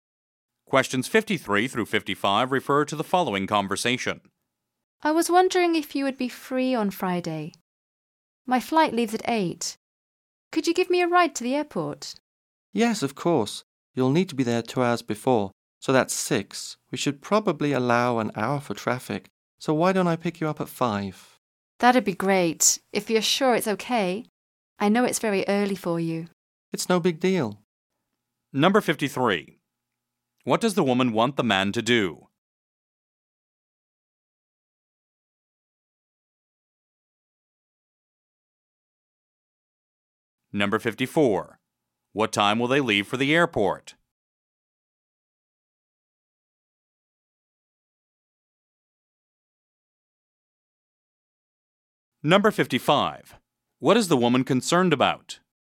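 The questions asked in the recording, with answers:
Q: What does the woman want the man to do?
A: Give her a ride to the airport

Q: What time will they leave for the airport?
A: At 5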